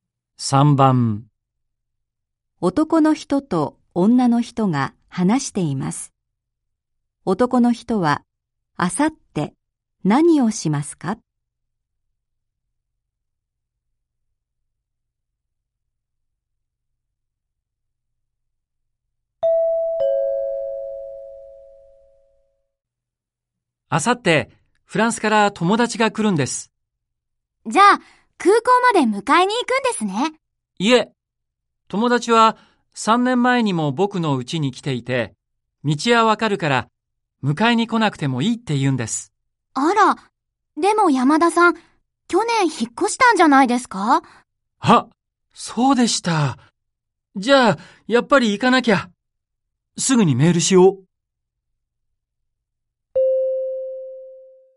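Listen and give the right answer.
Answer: 空港まで友達を迎えに行く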